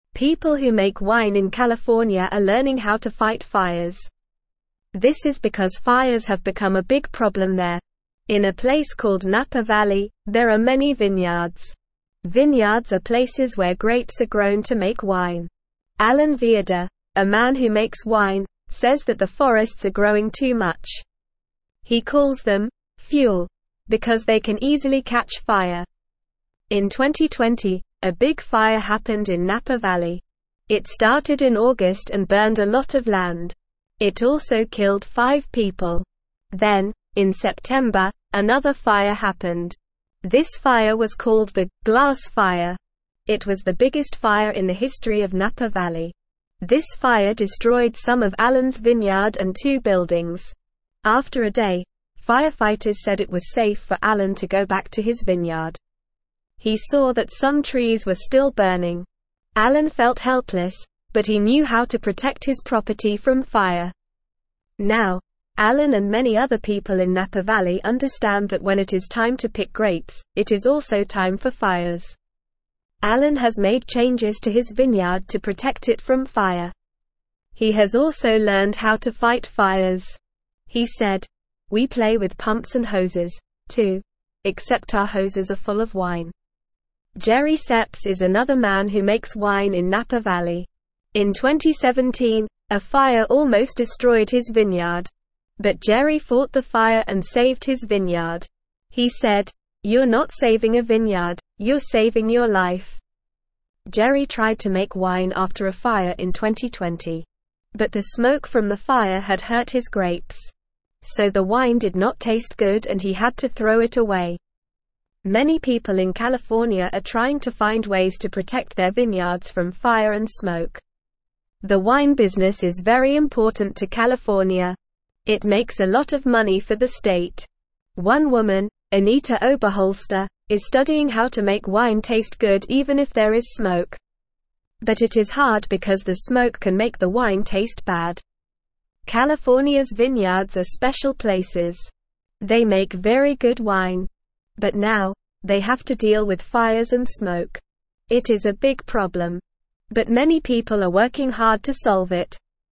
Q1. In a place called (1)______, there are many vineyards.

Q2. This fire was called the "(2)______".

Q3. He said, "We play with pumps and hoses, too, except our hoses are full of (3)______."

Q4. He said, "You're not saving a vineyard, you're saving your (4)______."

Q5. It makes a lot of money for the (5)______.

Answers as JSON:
{"1": "Napa Valley", "2": "Glass Fire", "3": "wine", "4": "life", "5": "state"}

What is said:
People who make wine in California are learning how to fight fires. This is because fires have become a big problem there. In a place called Napa Valley, there are many vineyards. Vineyards are places where grapes are grown to make wine. Alan Viader, a man who makes wine, says that the forests are growing too much. He calls them "fuel" because they can easily catch fire.
In 2020, a big fire happened in Napa Valley. It started in August and burned a lot of land. It also killed five people. Then, in September, another fire happened. This fire was called the "Glass Fire". It was the biggest fire in the history of Napa Valley. This fire destroyed some of Alan's vineyard and two buildings. After a day, firefighters said it was safe for Alan to go back to his vineyard. He saw that some trees were still burning. Alan felt helpless, but he knew how to protect his property from fire.
Now, Alan and many other people in Napa Valley understand that when it is time to pick grapes, it is also time for fires. Alan has made changes to his vineyard to protect it from fire. He has also learned how to fight fires. He said, "We play with pumps and hoses, too, except our hoses are full of wine."
Jerry Seps is another man who makes wine in Napa Valley. In 2017, a fire almost destroyed his vineyard. But Jerry fought the fire and saved his vineyard. He said, "You're not saving a vineyard, you're saving your life." Jerry tried to make wine after a fire in 2020. But the smoke from the fire had hurt his grapes. So the wine did not taste good and he had to throw it away.
Many people in California are trying to find ways to protect their vineyards from fire and smoke. The wine business is very important to California. It makes a lot of money for the state. One woman, Anita Oberholster, is studying how to make wine taste good even if there is smoke.
Why is Anita Oberholster studying how to make wine taste good even if there is smoke?
Go to answers ⇩
But it is hard because the smoke can make the wine taste bad.
California's vineyards are special places. They make very good wine. But now, they have to deal with fires and smoke. It is a big problem. But many people are working hard to solve it.

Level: Level 1